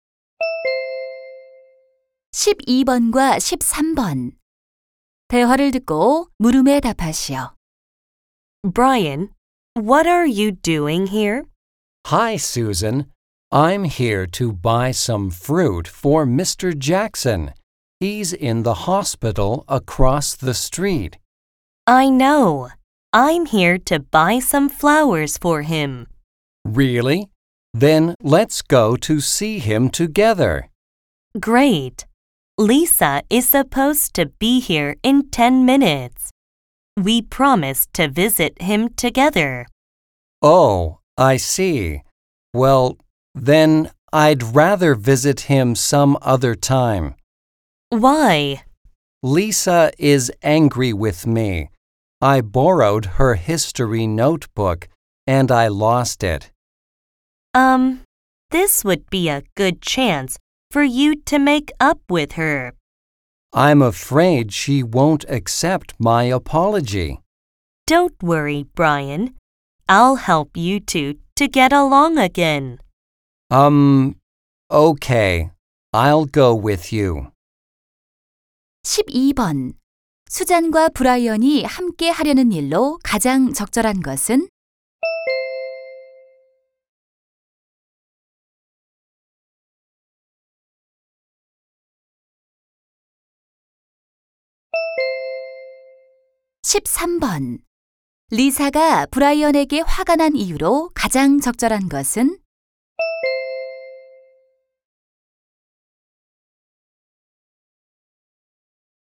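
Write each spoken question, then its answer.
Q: 수잔과 브라이언이 함께 하려는 일로 가장 적절한 것은?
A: 입원한 잭슨 선생님 병문안 가기

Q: 리사가 브라이언에게 화가 난 이유로 가장 적절한 것은?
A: 빌린 역사 공책을 잃어버려서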